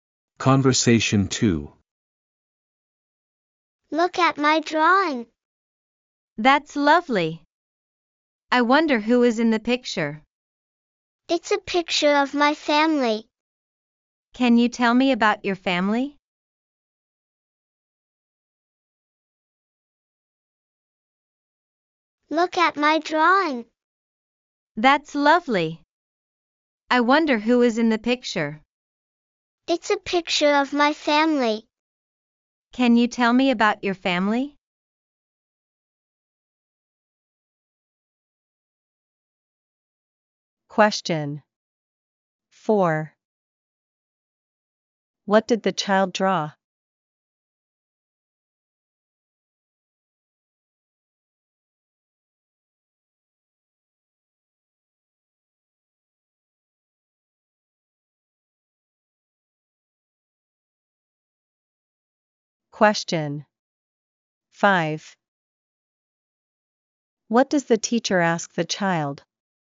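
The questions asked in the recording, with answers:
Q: What did the child draw?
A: A picture of their family

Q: What does the teacher ask the child?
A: To tell about their family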